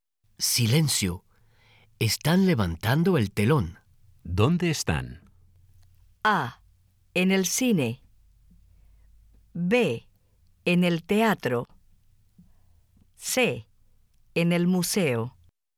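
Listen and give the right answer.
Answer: B: En el teatro.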